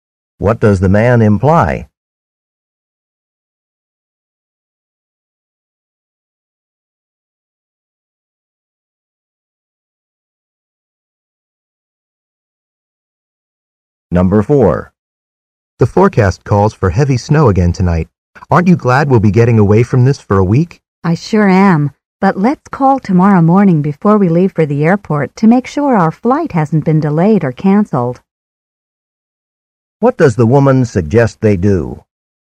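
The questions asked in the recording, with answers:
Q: What does the woman suggest they do?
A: Call the next morning to check whether their flight is delayed or canceled.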